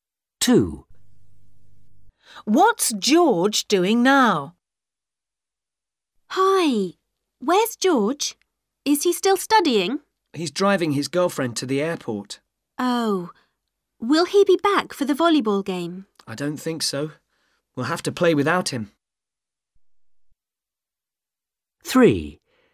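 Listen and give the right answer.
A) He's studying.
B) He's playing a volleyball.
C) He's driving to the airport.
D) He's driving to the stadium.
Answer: C) He's driving to the airport.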